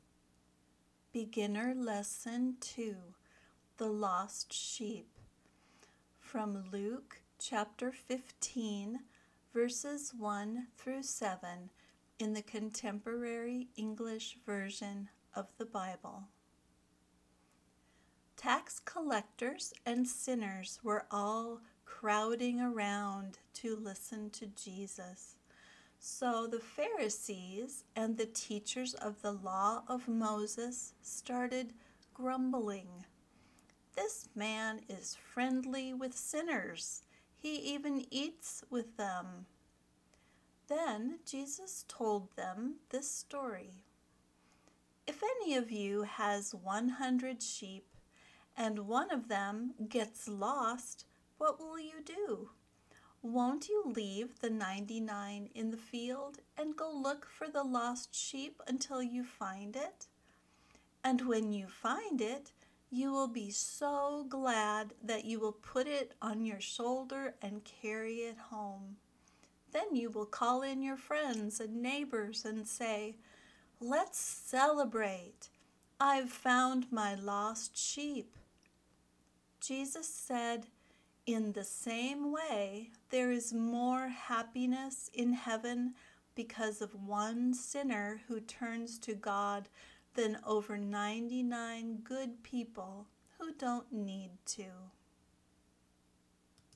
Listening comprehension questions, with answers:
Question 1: Who came to listen to Jesus?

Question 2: How many sheep did the shepherd have?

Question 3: How many sheep became lost?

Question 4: Who did the shepherd call when he found the lost sheep?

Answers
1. Tax collectors and sinners
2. 100
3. 1
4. He called his friends and neighbors.

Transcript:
Tax collectors and sinners were all crowding around to listen to Jesus. So the Pharisees and the teachers of the Law of Moses started grumbling, "This man is friendly with sinners. He even eats with them."
Then Jesus told them this story:
If any of you has 100 sheep, and one of them gets lost, what will you do? Won't you leave the 99 in the field and go look for the lost sheep until you find it? And when you find it, you will be so glad that you will put it on your shoulder and carry it home. Then you will call in your friends and neighbors and say, "Let's celebrate! I've found my lost sheep."
Jesus said, "In the same way there is more happiness in heaven because of one sinner who turns to God than over 99 good people who don't need to."

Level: Beginner